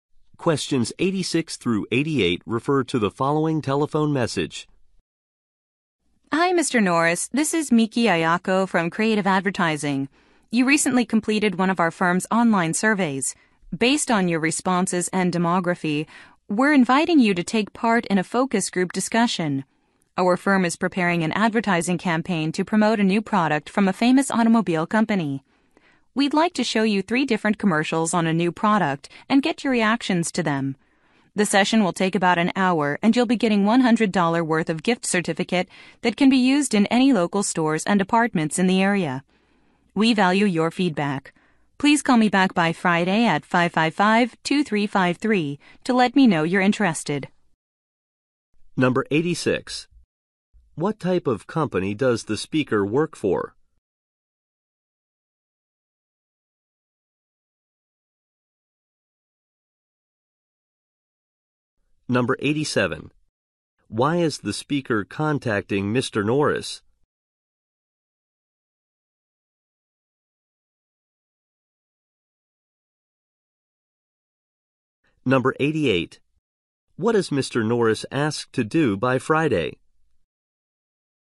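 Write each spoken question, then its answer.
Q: What type of company does the speaker work for?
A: An advertising firm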